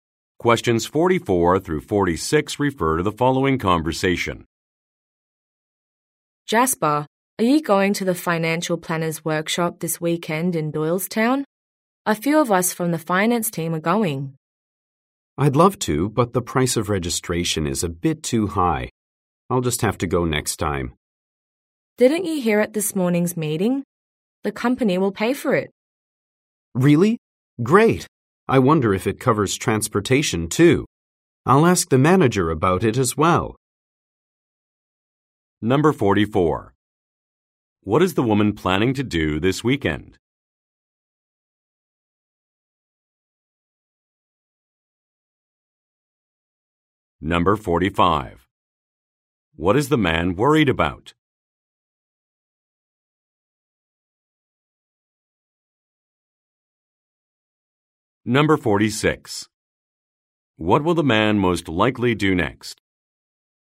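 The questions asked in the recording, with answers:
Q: What is the woman planning to do this weekend?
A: Attend a financial planner's workshop

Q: What is the man worried about?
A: The registration price

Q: What will the man most likely do next?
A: Ask the manager about transportation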